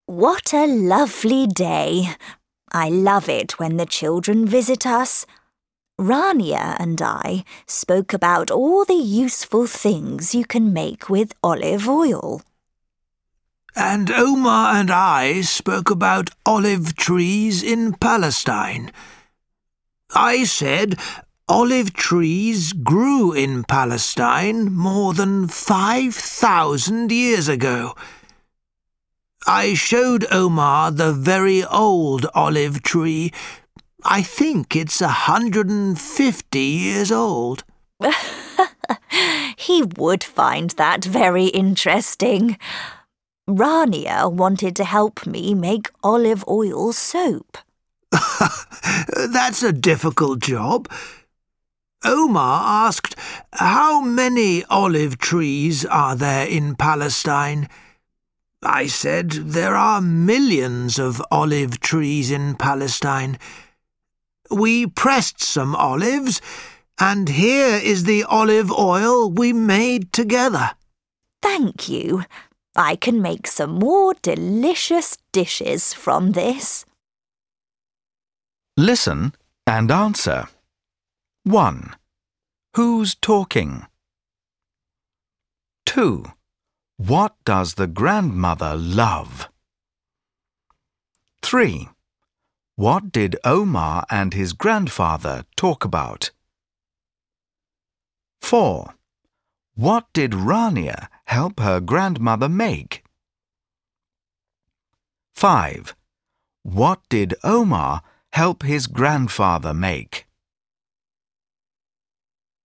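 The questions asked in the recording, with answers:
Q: What does the grandmother love?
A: She loves it when the children visit

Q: What did Omar and his grandfather talk about?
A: Olive trees in Palestine

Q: What did Rania help her grandmother make?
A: Olive oil soap

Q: What did Omar help his grandfather make?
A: Olive oil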